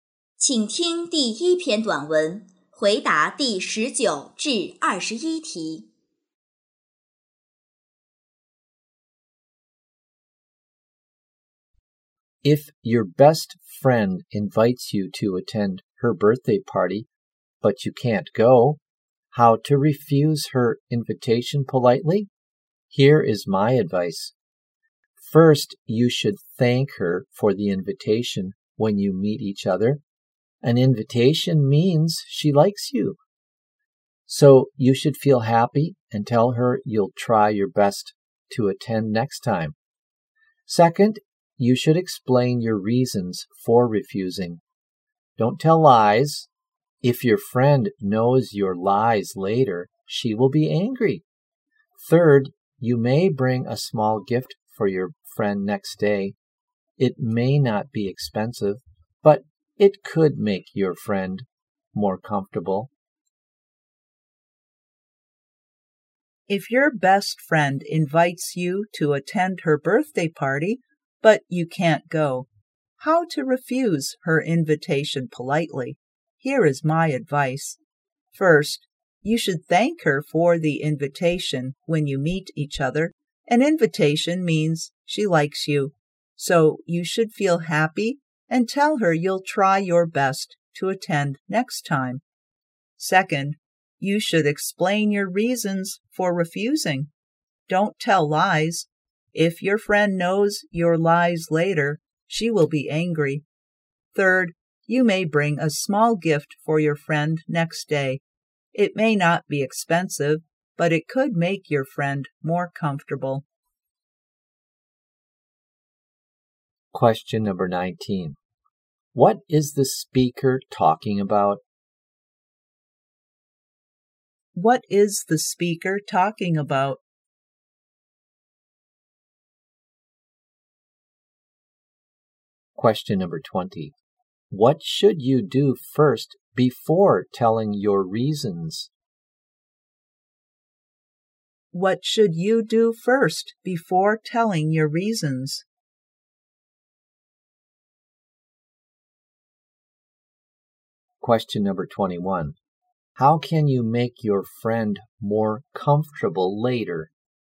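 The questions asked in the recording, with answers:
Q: What is the speaker talking about?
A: How to refuse an invitation politely.

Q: What should you do first before telling your reasons?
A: Thank your friend for the invitation.

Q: How can you make your friend more comfortable later?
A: Bring her a small gift the next day.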